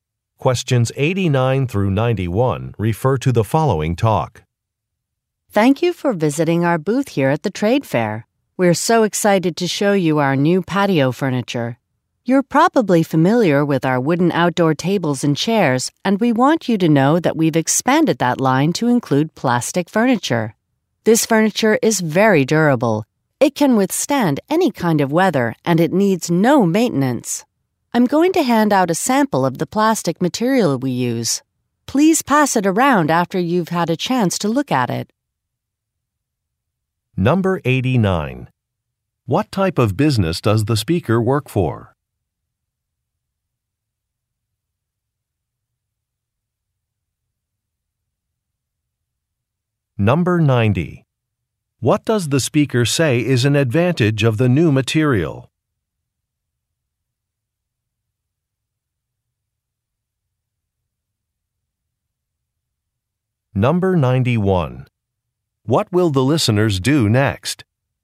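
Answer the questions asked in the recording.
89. An outdoor (patio) furniture maker
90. It is durable, weatherproof and needs no maintenance
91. Look at and pass around a sample of the material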